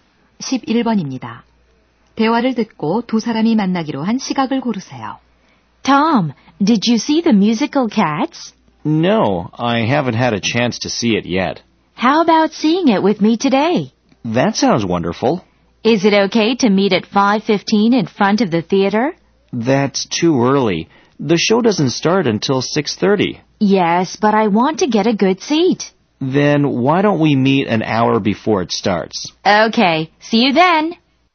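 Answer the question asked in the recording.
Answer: 5시 30분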